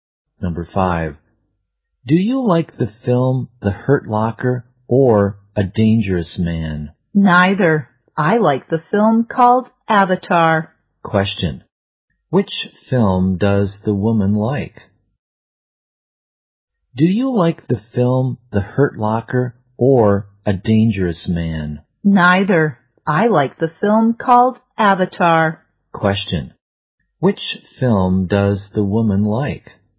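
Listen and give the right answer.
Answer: Avatar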